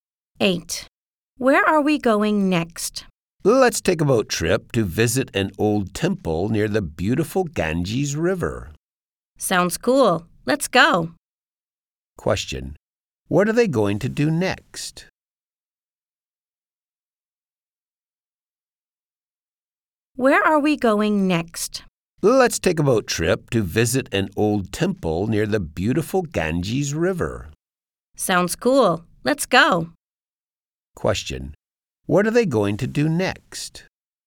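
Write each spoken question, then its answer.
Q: What are they going to do next?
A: Take a boat trip to visit an old temple near the Ganges River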